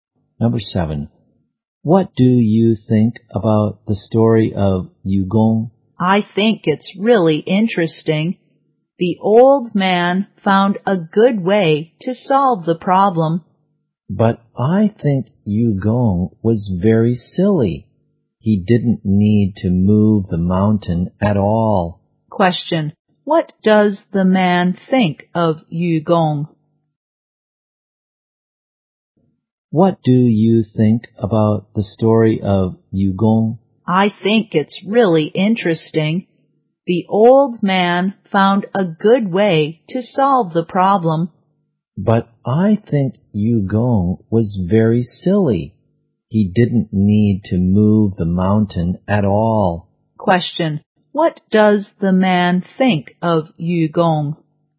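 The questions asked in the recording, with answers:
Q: What does the man think of Yugong?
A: He thinks Yugong was very silly.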